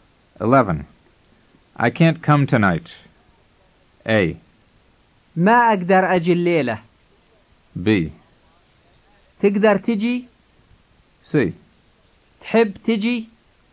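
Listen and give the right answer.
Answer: A: ما أقدر أجي الليلة.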